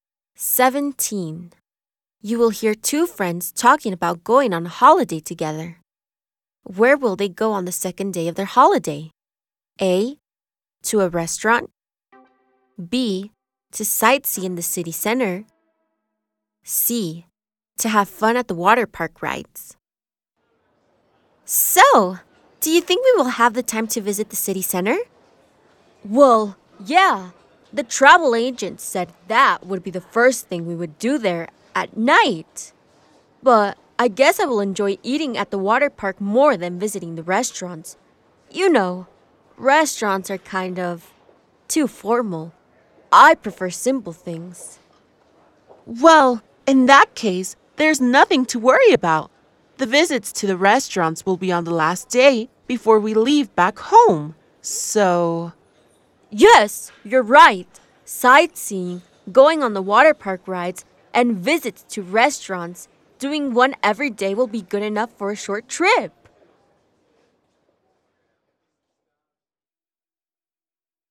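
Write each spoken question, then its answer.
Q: Where will they go on the second day of their holiday?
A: C: To have fun at the water park rides.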